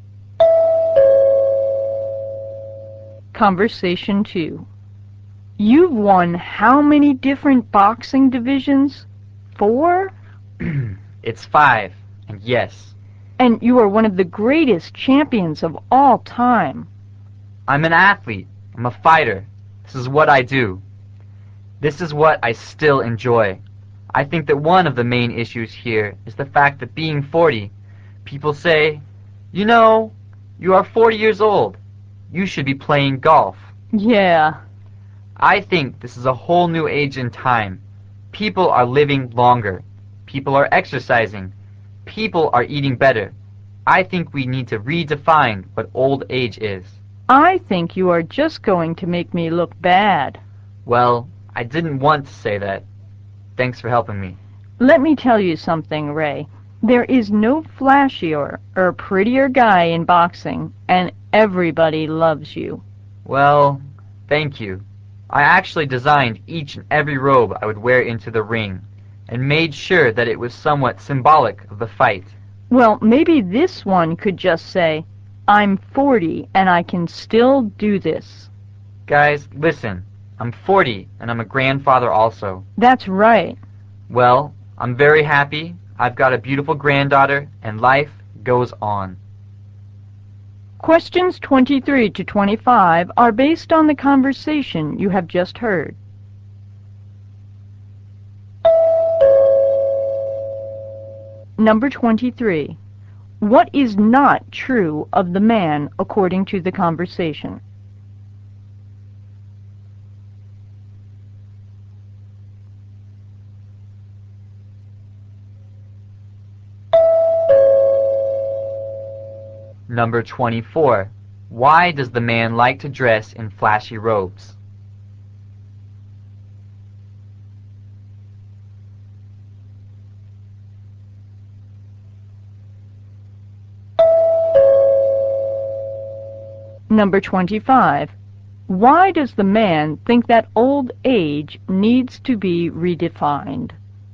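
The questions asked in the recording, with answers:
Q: Why does the man like to dress in flashy robes?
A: Each robe is meant to be somewhat symbolic of the fight

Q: Why does the man think that old age needs to be redefined?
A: People live longer, exercise more and eat better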